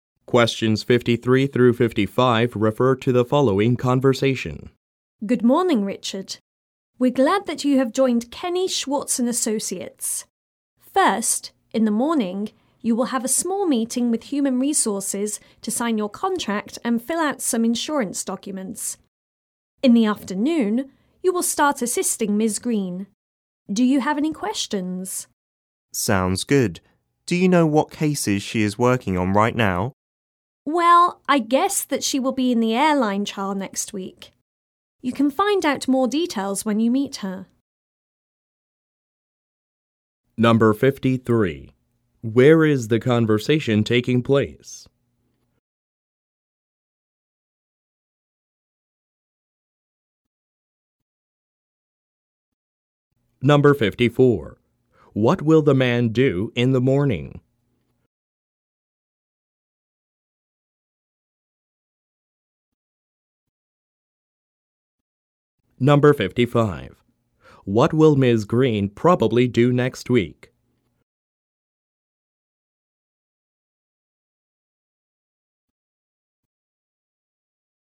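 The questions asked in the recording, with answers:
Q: What will the man do in the morning?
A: Meet with Human Resources to sign his contract and fill out insurance documents

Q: What will Ms. Green probably do next week?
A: Be in the airline trial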